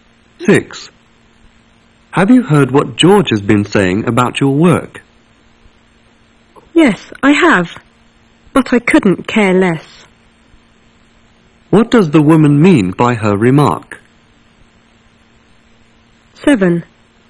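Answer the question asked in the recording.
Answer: She doesn't care what George says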